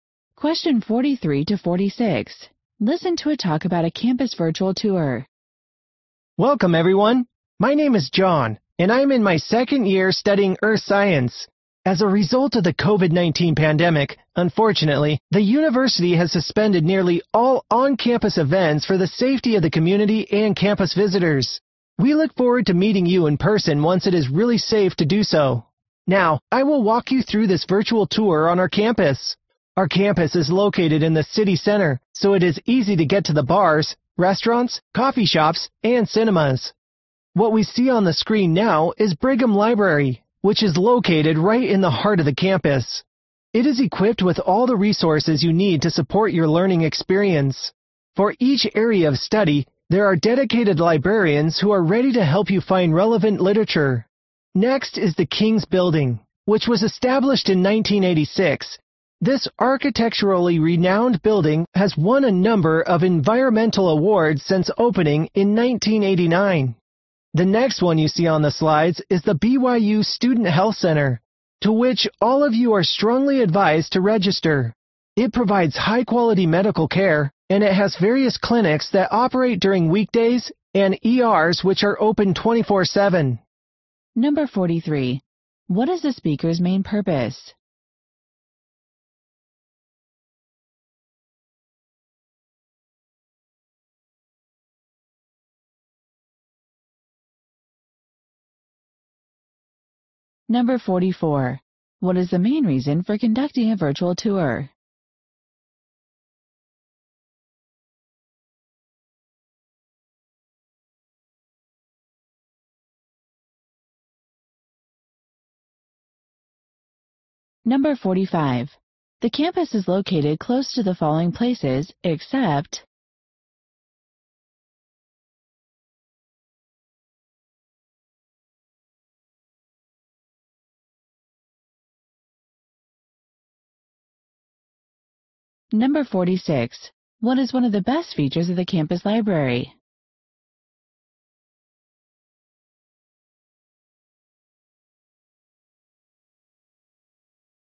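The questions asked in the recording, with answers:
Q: What is the speaker's main purpose?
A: To give a virtual tour of the campus

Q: What is the main reason for conducting a virtual tour?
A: On-campus events were suspended because of the COVID-19 pandemic

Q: What is one of the best features of the campus library?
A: Dedicated librarians for each area of study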